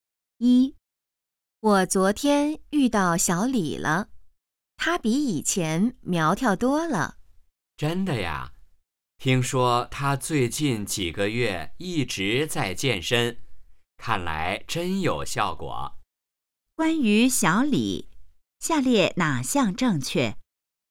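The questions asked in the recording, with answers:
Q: 关于小李,下列哪项正确?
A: 他比以前苗条多了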